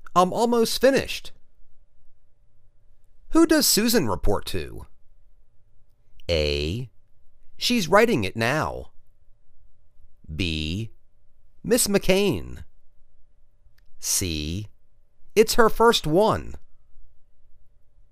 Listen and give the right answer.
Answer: Ms. McCain.